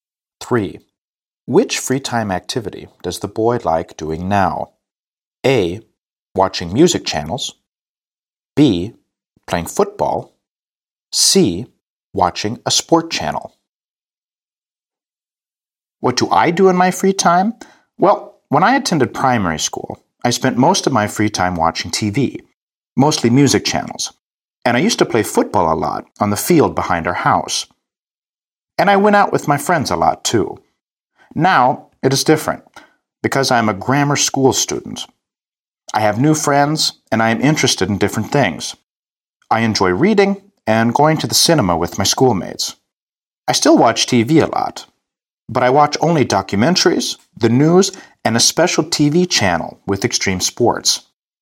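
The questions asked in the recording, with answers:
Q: Which free time activity does the boy like doing now?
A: C: Watching a sport channel.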